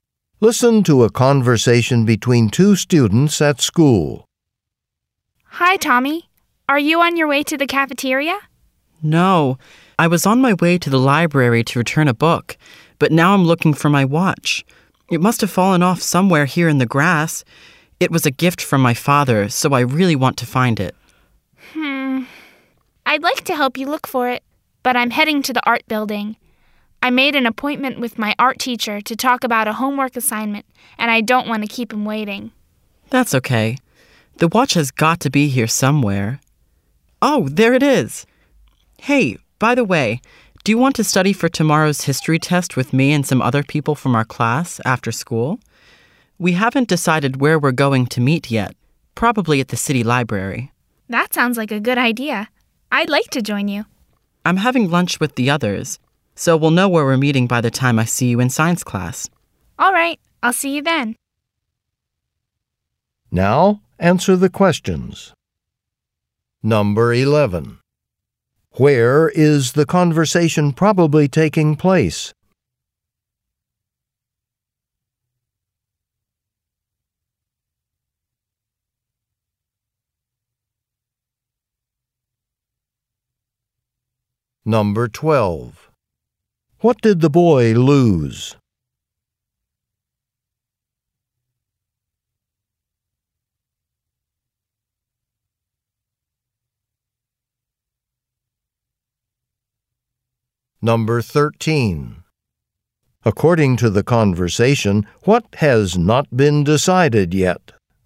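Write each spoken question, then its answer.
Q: What did the boy lose?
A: His watch

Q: According to the conversation, what has not been decided yet?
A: Where they will meet to study for the history test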